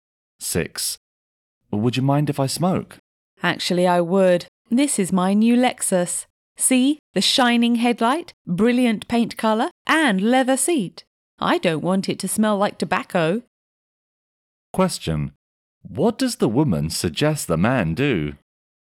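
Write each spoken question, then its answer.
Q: What does the woman suggest the man do?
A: Not smoke in her new car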